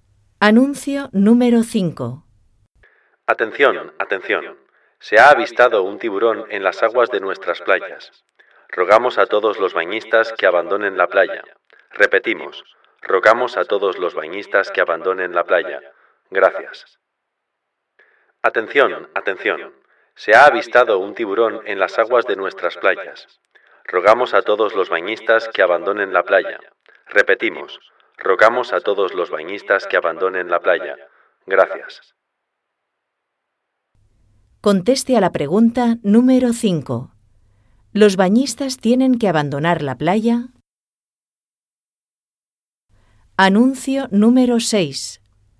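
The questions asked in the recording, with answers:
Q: ¿Los bañistas tienen que abandonar la playa?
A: Sí, porque se ha avistado un tiburón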